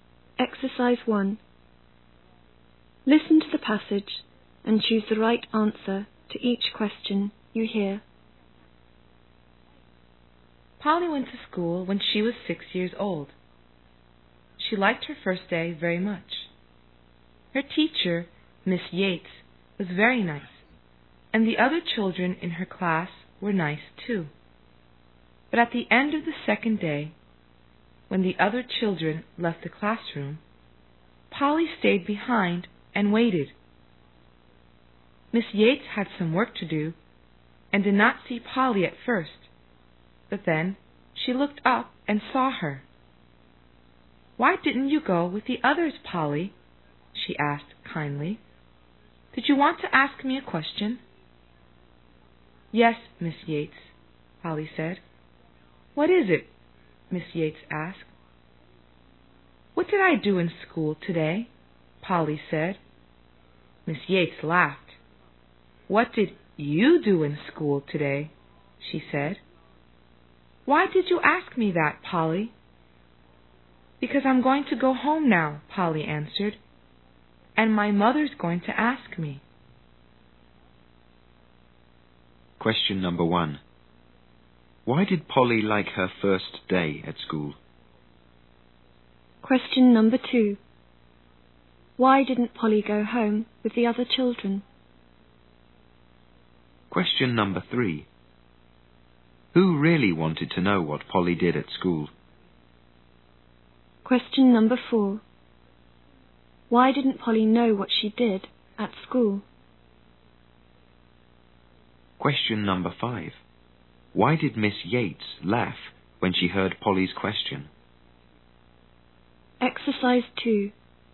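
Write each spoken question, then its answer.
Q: Why did Polly like her first day at school?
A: Her teacher and the other children were nice

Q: Why didn't Polly go home with the other children?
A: She wanted to ask Miss Yates a question

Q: Who really wanted to know what Polly did at school?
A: Her mother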